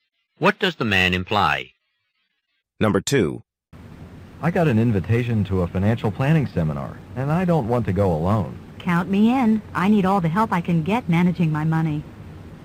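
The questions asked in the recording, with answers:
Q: What will the woman probably do?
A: Go to the financial planning seminar with the man.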